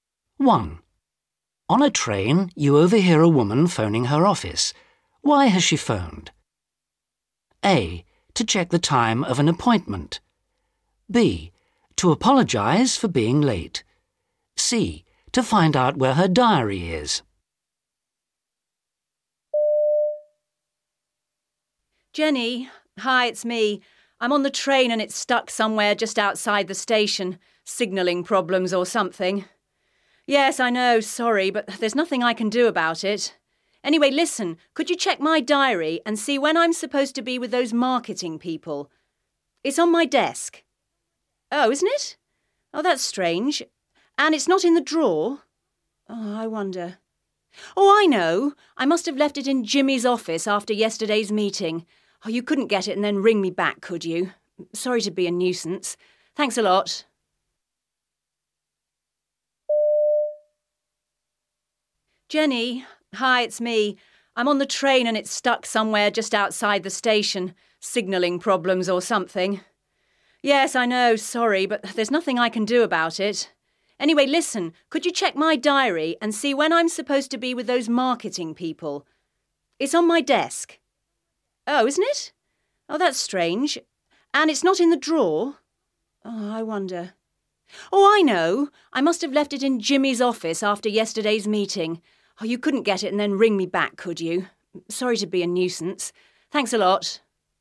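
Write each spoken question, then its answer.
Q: Why has she phoned? A. To check the time of an appointment. B. To apologise for being late. C. To find out where her diary is.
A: A: To check the time of an appointment.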